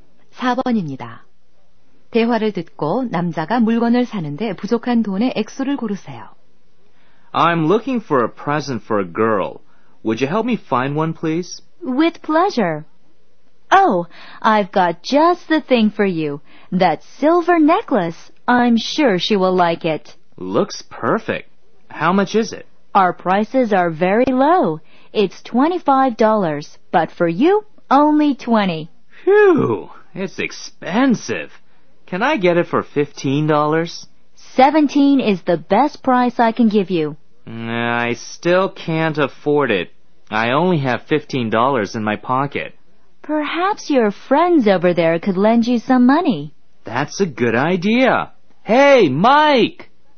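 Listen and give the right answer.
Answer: 2달러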